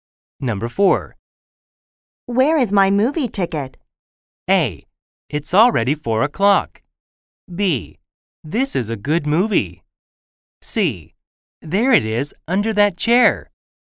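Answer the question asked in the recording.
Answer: C: There it is, under that chair.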